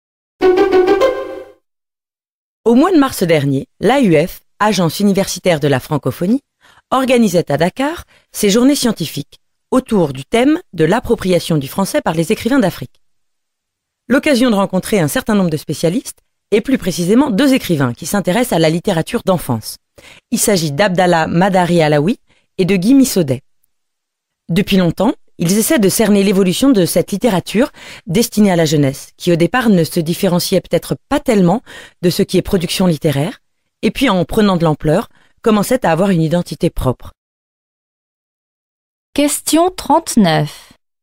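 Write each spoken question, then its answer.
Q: Selon la journaliste, en Afrique, quelle tendance suit la littérature destinée à la jeunesse?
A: Elle prend de l'ampleur et acquiert une identité propre.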